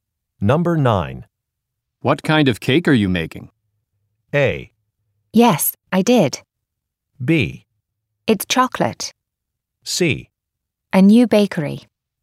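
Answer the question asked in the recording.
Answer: B: It's chocolate.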